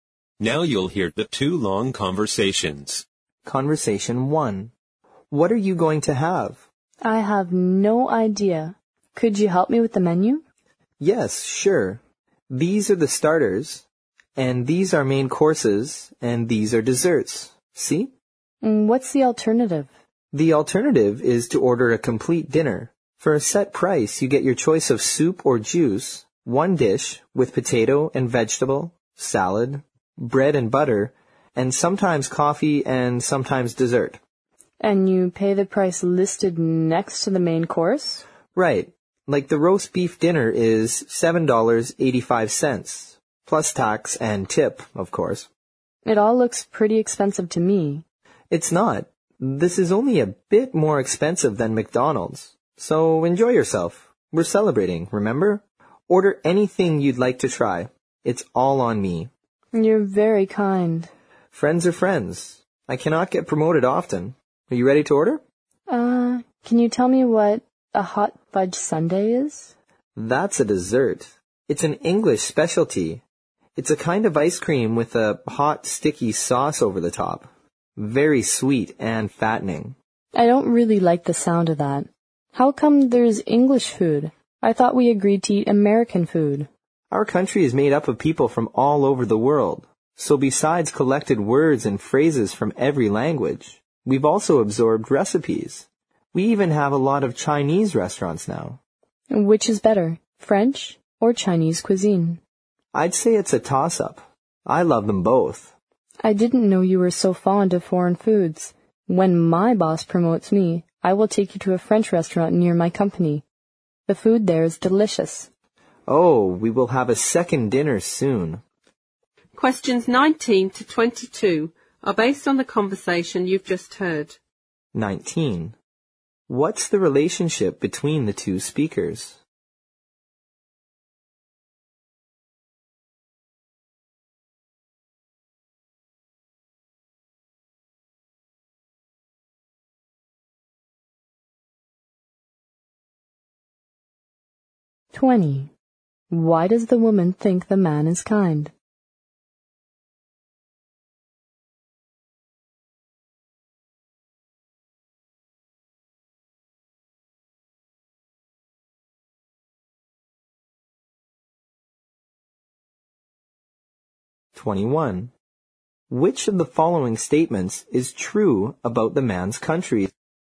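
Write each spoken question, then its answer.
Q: What's the relationship between the two speakers?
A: Friends

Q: Why does the woman think the man is kind?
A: He is paying for the dinner

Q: Which of the following statements is true about the man's country?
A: It is made up of people from all over the world and has absorbed their recipes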